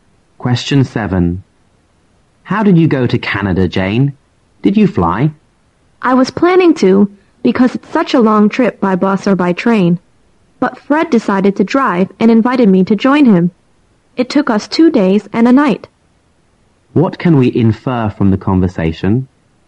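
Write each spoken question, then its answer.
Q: What can we infer from the conversation?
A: Jane went to Canada by car with Fred.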